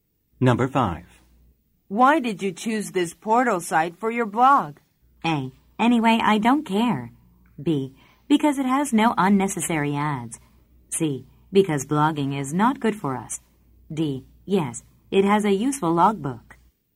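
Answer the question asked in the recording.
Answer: B: Because it has no unnecessary ads.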